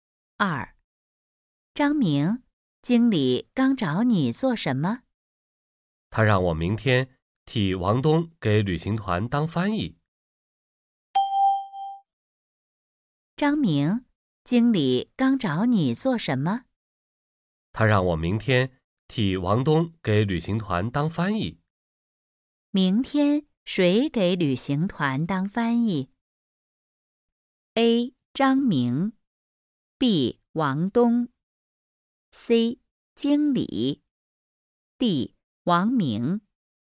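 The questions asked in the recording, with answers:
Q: 明天谁给旅行团当翻译?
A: A: 张明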